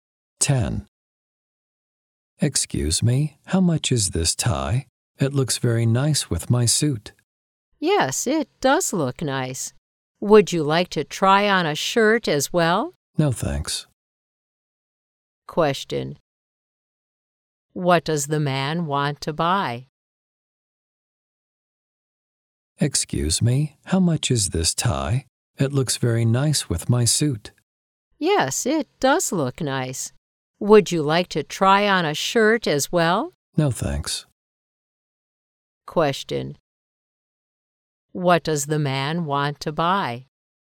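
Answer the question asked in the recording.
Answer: A tie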